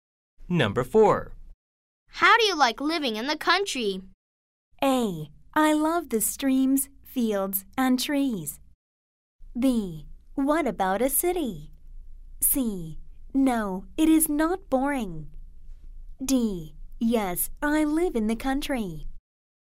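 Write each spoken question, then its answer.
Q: How do you like living in the country?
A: A: I love the streams, fields, and trees.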